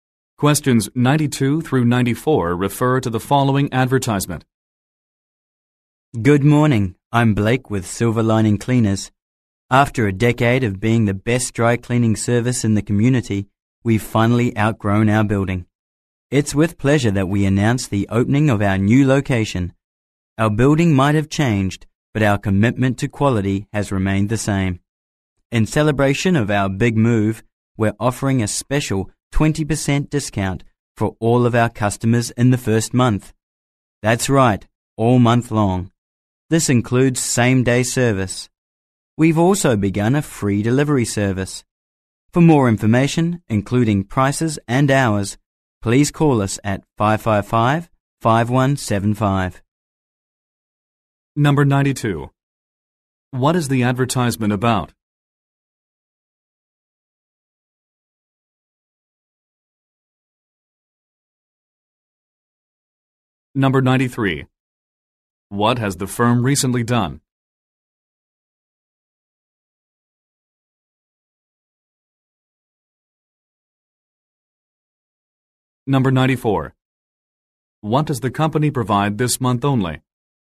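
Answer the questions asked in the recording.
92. A dry cleaner's new location
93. Moved to a new location
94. A 20% discount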